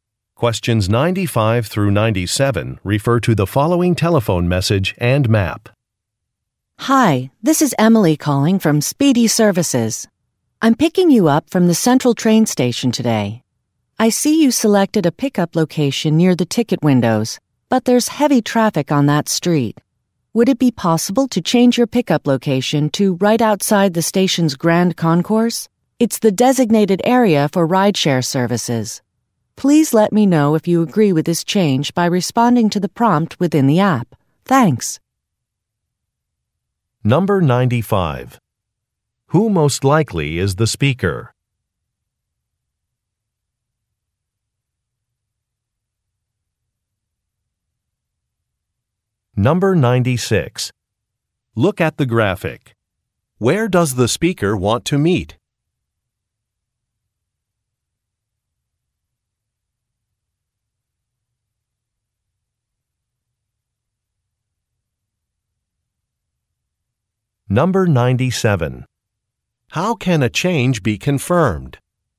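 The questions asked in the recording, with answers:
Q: Who most likely is the speaker?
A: A rideshare driver

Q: How can a change be confirmed?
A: By responding to the prompt in the app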